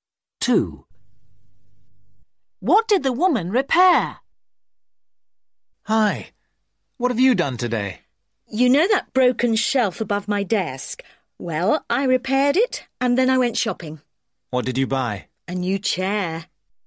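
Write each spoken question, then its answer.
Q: What did the woman repair?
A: A shelf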